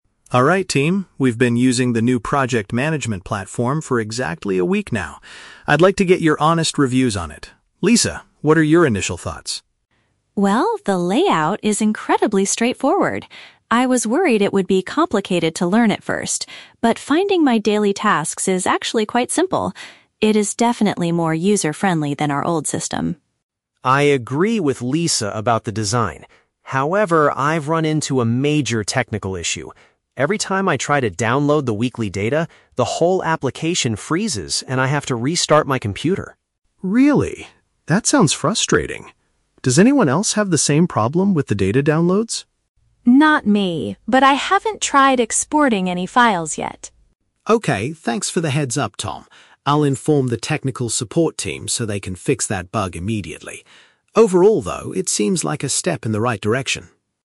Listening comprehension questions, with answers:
Listen to a team discussing a new software program in a meeting. Choose the correct answer (A, B, or C).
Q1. What is Lisa's opinion of the new software?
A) It is very complicated to learn.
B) It is easy to navigate and use.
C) It has a very modern and colorful look.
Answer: It is easy to navigate and use.

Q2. What problem did Tom experience with the platform?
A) The program stops responding when saving reports.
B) He couldn't find his daily assignments on the screen.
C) His computer was infected by a harmful virus.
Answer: The program stops responding when saving reports.

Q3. What does Mark plan to do after the meeting?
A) Go back to using the old management system.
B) Teach Lisa how to export the weekly data.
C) Report the software error to the IT department.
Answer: Report the software error to the IT department.

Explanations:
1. Lisa says the layout is "incredibly straightforward" and "finding my daily tasks is actually quite simple". This is a B1-level paraphrase for being "easy to navigate and use".
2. Tom complains that when he tries to "download the weekly data" (saving reports), the whole application "freezes" (stops responding).
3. Mark says he will "inform the technical support team so they can fix that bug." The "technical support team" is another way to say the IT department, and a "bug" is a software error.

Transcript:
Mark: Alright team, we've been using the new project management platform for exactly a week now. I'd like to get your honest reviews on it. Lisa, what are your initial thoughts?
Lisa: Well, the layout is incredibly straightforward. I was worried it would be complicated to learn at first, but finding my daily tasks is actually quite simple. It is definitely more user-friendly than our old system.
Tom: I agree with Lisa about the design. However, I've run into a major technical issue. Every time I try to download the weekly data, the whole application freezes and I have to restart my computer.
Mark: Really? That sounds frustrating. Does anyone else have the same problem with the data downloads?
Lisa: Not me, but I haven't tried exporting any files yet.
Mark: Okay, thanks for the heads-up, Tom. I'll inform the technical support team so they can fix that bug immediately. Overall, though, it seems like a step in the right direction.

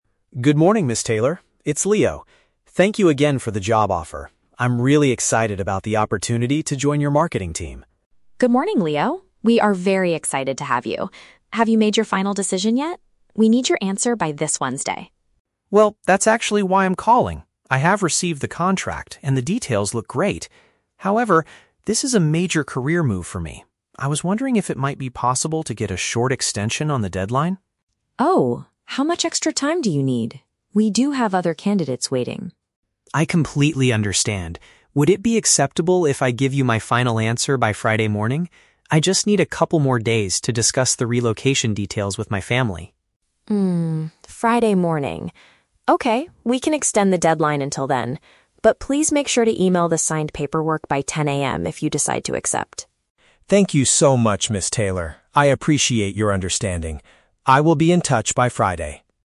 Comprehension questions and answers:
Listen to the telephone conversation between a job applicant and a company representative. Choose the correct answer (A, B, or C) for each question.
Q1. What is the main reason for Leo's phone call?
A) To politely reject the position in the marketing team.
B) To ask for more time to make his professional choice.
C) To negotiate a better salary in his new contract.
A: To ask for more time to make his professional choice.

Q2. What excuse does Leo give for his request?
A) He is currently waiting to hear back from another company.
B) He needs more time to read the contract carefully.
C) He wants to talk about moving arrangements with his relatives.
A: He wants to talk about moving arrangements with his relatives.

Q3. What does Ms. Taylor agree to do?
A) Wait until the end of the workweek for his response.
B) Send him the signed paperwork by 10 AM on Friday.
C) Interview other potential candidates while waiting for him.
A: Wait until the end of the workweek for his response.

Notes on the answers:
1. Leo asks "if it might be possible to get a short extension on the deadline". Option (B) correctly paraphrases this request (extension = more time; final decision = professional choice). Option (A) is The Trap: He is calling about the offer, but he says he is "excited", not rejecting it. Option (C) is The Trap: He mentions the "contract", but says the details "look great", he is not negotiating money.
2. Leo tells Ms. Taylor: "I just need a couple more days to discuss the relocation details with my family." Option (C) uses direct synonyms (moving arrangements = relocation details; relatives = family). Option (A) is The Trap: Although in reality (according to the context you provided) this is the true reason, it should absolutely not be mentioned in the listening passage (the subtle reason he used)! Choosing A is a trap of personal interpretation. Option (B) is also a trap because it's reasonable, but he said the contract "looks great."
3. Ms. Taylor agrees to extend the deadline to "Friday morning", which is accurately paraphrased as "the end of the workweek". Option (B) is The Trap: She asked Leo to send (email the signed paperwork) to her, not that she sent it to Leo. (A case of shifting blame onto someone else). Option (C) is The Trap: She said "we have other candidates waiting," not that she would be interviewing them at this time.

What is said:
Taylor. It's Leo. Thank you again for the job offer. I'm really excited about the opportunity to join your marketing team.
Taylor: Good morning, Leo! We are very excited to have you. Have you made your final decision yet? We need your answer by this Wednesday.
Leo: Well, that's actually why I'm calling. I have received the contract, and the details look great. However, this is a major career move for me. I was wondering if it might be possible to get a short extension on the deadline?
Taylor: Oh? How much extra time do you need? We do have other candidates waiting.
Leo: I completely understand. Would it be acceptable if I give you my final answer by Friday morning? I just need a couple more days to discuss the relocation details with my family.
Taylor: Hmm, Friday morning. Okay, we can extend the deadline until then. But please make sure to email the signed paperwork by 10 AM if you decide to accept.
Leo: Thank you so much, Ms. Taylor. I appreciate your understanding. I will be in touch by Friday.

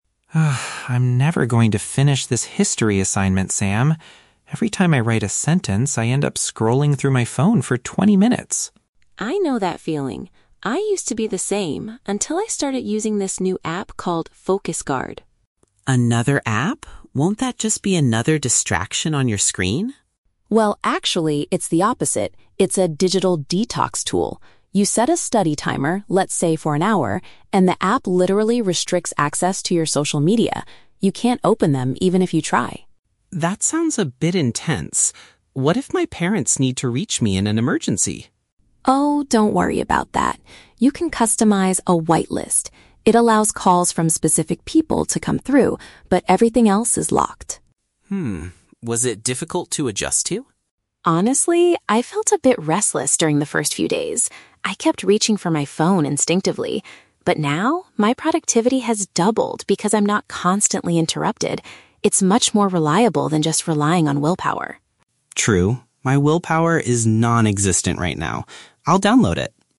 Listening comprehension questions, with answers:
Listen to a conversation between two roommates about a mobile application. For each question, choose the correct answer (A, B, or C).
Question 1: What is the primary function of the "FocusGuard" app?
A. It records the total amount of time spent on social media.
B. It prevents the user from opening certain apps for a period.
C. It sends a warning message when the user is distracted.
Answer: It prevents the user from opening certain apps for a period.

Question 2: How does the app handle urgent situations?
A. It automatically ends the timer if the phone rings.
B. It allows the user to contact emergency services only.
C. It permits calls from a pre-selected list of contacts.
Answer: It permits calls from a pre-selected list of contacts.

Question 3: What does Sam say about his experience using the app?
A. He found it very easy to use from the very first day.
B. He thinks it is less effective than moving the phone away.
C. He is now able to get more work done than before.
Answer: He is now able to get more work done than before.

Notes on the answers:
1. Sam says the app "restricts access to your social media" and "you can't open them." Option (B) is a paraphrase of this. Option (A) is a trap because many apps track time, but that's not what this one does. Option (C) is plausible but not mentioned in the script.
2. Sam explains that you can "customize a white list" which "allows calls from specific people." This is a direct paraphrase of option (C). Option (A) and (B) are incorrect because the timer doesn't end and it's not limited to emergency services.
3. Sam states, "my productivity has doubled." Option (C) paraphrases "productivity doubled" as "get more work done." Option (A) is a trap because Sam says he felt "restless" at first (it wasn't easy). Option (B) is wrong because he says the app is "more reliable than willpower."

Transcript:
Alex: Ugh, I'm never going to finish this history assignment, Sam. Every time I write a sentence, I end up scrolling through my phone for twenty minutes!
Sam: I know that feeling. I used to be the same until I started using this new app called "FocusGuard."
Alex: Another app? Won't that just be another distraction on your screen?
Sam: Well, actually, it's the opposite. It's a "digital detox" tool. You set a study timer—let's say for an hour—and the app literally restricts access to your social media. You can't open them even if you try.
Alex: That sounds a bit intense. What if my parents need to reach me in an emergency?
Sam: Oh, don't worry about that. You can customize a "white list." It allows calls from specific people to come through, but everything else is locked.
Alex: Hmm. Was it difficult to adjust to?
Sam: Honestly, I felt a bit restless during the first few days. I kept reaching for my phone instinctively. But now, my productivity has doubled because I'm not constantly interrupted. It's much more reliable than just relying on willpower!

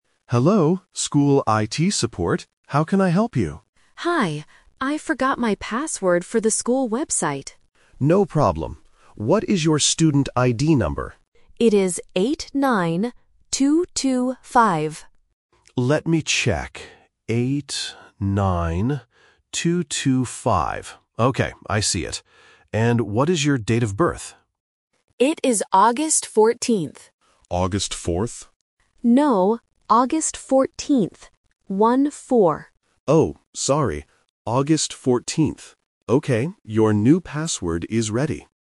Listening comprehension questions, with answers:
Listen to the phone call between a student and IT support. Choose the correct answer (A, B, or C) for each question.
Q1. What did the student forget?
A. His student ID.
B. His password.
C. The school website.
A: His password.

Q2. What is the student ID number?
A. 89-225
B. 89-255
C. 98-225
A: 89-225

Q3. When is the student's birthday?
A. August 4th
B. October 14th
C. August 14th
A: August 14th

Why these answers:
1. The student clearly says, "I forgot my password for the school website." Option (A) is a trap; the IT staff asks for his student ID later, but he didn't forget it. Option (C) is where he needs to log in, not what he forgot.
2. Both the student and the IT staff say the number "8-9, 2-2-5". Option (B) "89-255" is a trap that puts the "double" sound on the number 5 instead of the number 2. Option (C) mixes up the first two numbers.
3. The student says his date of birth is "August 14th". Option (A) "August 4th" is the trap; the IT staff guesses this, but the student rejects it and clarifies, "No, August 14th. One-four." Option (B) is a different month not mentioned in the audio.

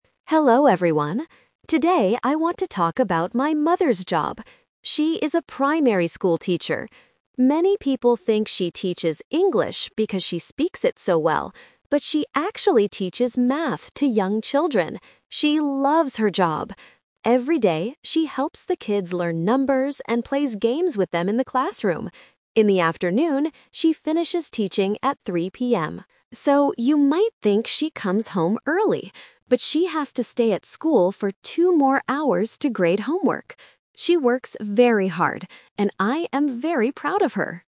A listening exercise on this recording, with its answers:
Listen to a student talking about his mother's job. Circle the correct answer (A, B, or C).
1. What subject does Sam's mother teach?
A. English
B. Math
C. Art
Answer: Math

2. What does she do with the children in the classroom?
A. She plays games with them.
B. She grades their homework.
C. She reads books to them.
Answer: She plays games with them.

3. What does Sam's mother do after 3 PM?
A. She goes home early.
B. She plays with the children.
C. She stays at school to grade homework.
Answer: She stays at school to grade homework.

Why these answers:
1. Sam says, "...she actually teaches math to young children." Option (A) is the trap: many people think she teaches English, but she doesn't. Option (C) is a plausible school subject, but it is not mentioned.
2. Sam explicitly states, "...and plays games with them in the classroom." Option (B) is a trap because she grades homework later in the afternoon, not with the children. Option (C) is a plausible teacher activity, but it is not mentioned in the audio.
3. Sam explains that although she finishes teaching at 3 PM, "...she has to stay at school for two more hours to grade homework." Option (A) is the trap: Sam says you might think she comes home early, but she doesn't. Option (B) is a trap because she plays with the children earlier in the day.

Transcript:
Sam: Hello everyone. Today I want to talk about my mother's job. She is a primary school teacher. Many people think she teaches English because she speaks it so well. But she actually teaches math to young children. She loves her job! Every day, she helps the kids learn numbers and plays games with them in the classroom. In the afternoon, she finishes teaching at 3 PM. So, you might think she comes home early. But she has to stay at school for two more hours to grade homework. She works very hard, and I am very proud of her.

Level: A2

